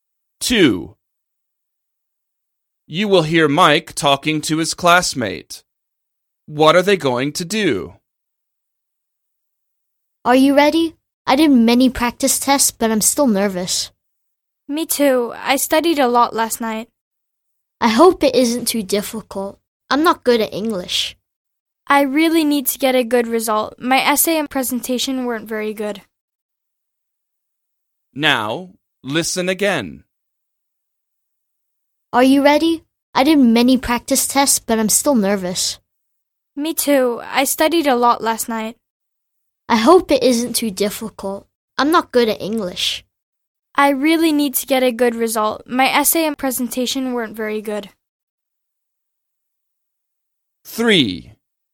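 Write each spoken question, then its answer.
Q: What are they going to do?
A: Take an (English) test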